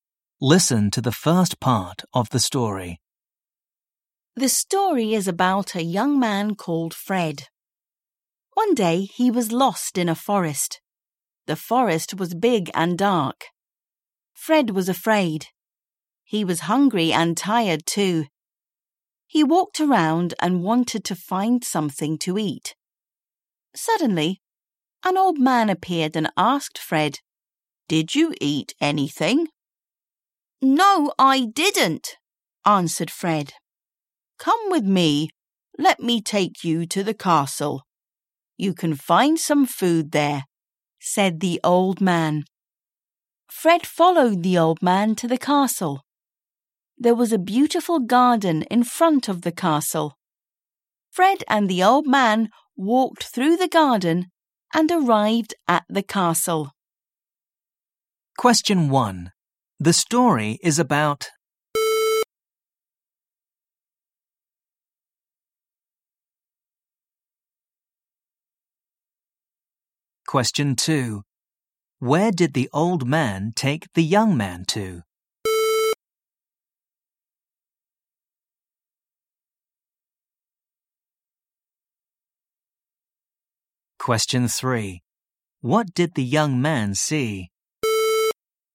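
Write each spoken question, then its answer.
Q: The story is about...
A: a young man called Fred

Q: Where did the old man take the young man to?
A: the castle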